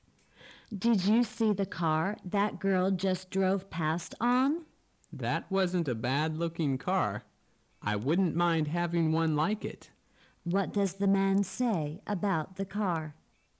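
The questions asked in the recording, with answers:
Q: What does the man say about the car?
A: He likes it and wouldn't mind having one like it

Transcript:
[听力原文] W: Did you see the car that girl just drove past on? M: That wasn't a bad-looking car. I wouldn't mind having one like it. Q: What does the man say about the car?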